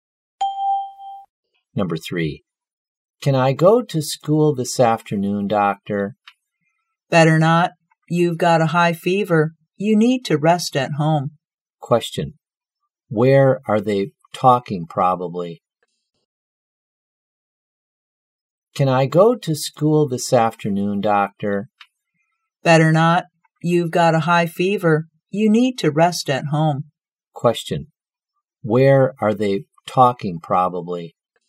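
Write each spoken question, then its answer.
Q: Where are they talking, probably?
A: At a hospital or doctor's office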